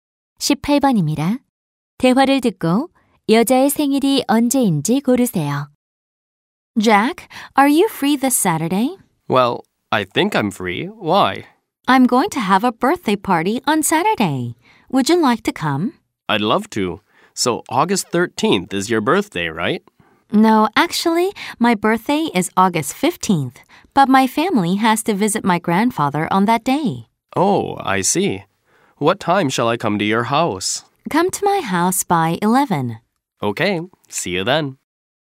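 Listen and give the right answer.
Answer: 8월 15일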